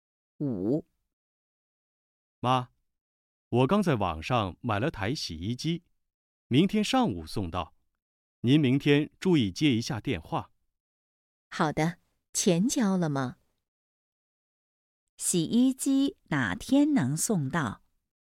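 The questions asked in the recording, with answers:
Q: 洗衣机哪天能送到?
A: 明天上午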